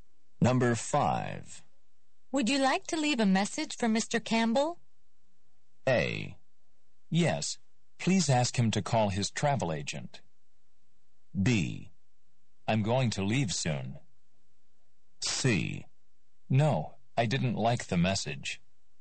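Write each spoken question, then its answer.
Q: Would you like to leave a message for Mr.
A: A: Yes, please ask him to call his travel agent.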